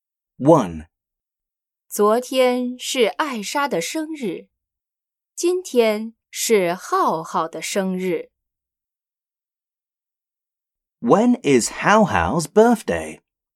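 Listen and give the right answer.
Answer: Today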